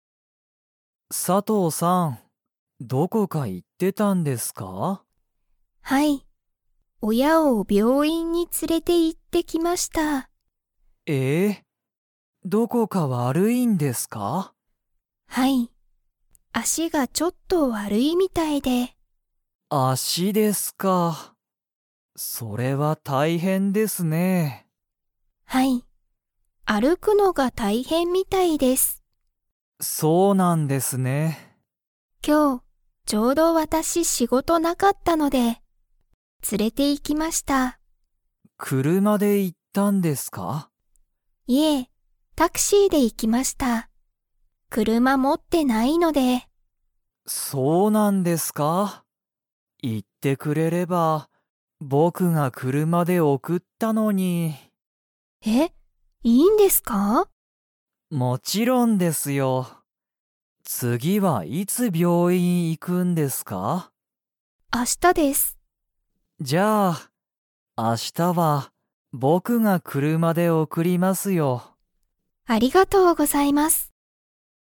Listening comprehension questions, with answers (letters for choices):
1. 佐藤さとうさんの親おやは、____のが大変たいへんみたいだ。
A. 勉強べんきょうする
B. 仕事しごとする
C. 連つれる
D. 歩あるく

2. 明日あしたは、佐藤さとうさんが親おやを車くるまで送おくりますか?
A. はい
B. いいえ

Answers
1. D
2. B

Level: Level 2